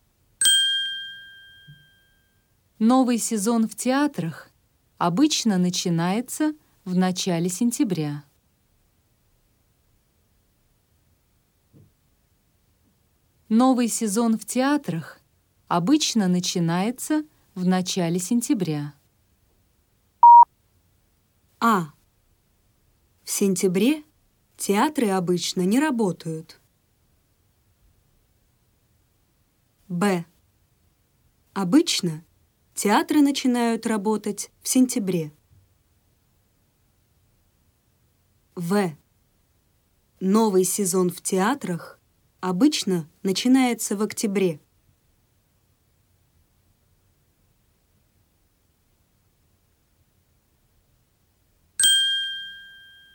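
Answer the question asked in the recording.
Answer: Б: Обычно театры начинают работать в сентябре.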